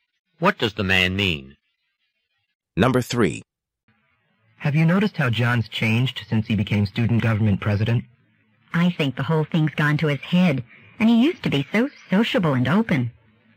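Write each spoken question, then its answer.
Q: What does the woman mean?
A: John has become conceited and less sociable since becoming president.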